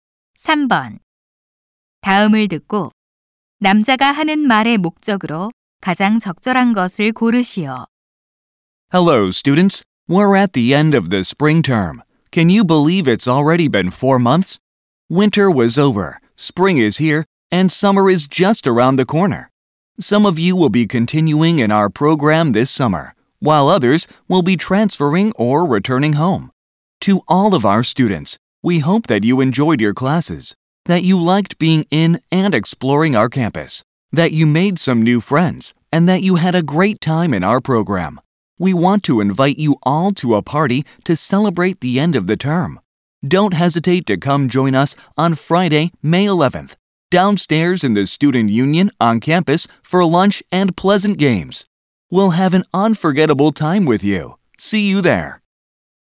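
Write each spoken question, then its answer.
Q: 다음을 듣고 남자가 하는 말의 목적으로 가장 적절한 것을 고르시오.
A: 학기말 파티에 초대하려고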